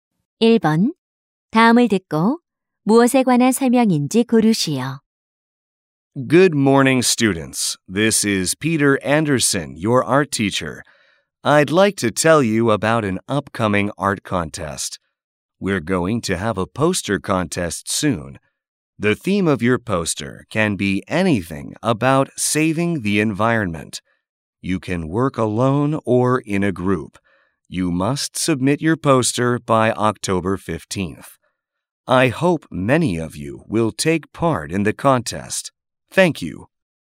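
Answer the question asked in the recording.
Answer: 포스터 대회 안내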